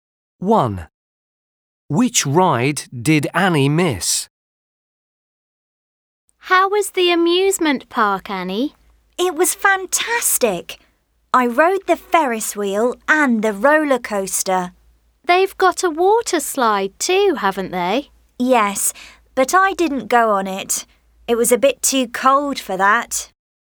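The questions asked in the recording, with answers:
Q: Which ride did Annie miss?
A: The water slide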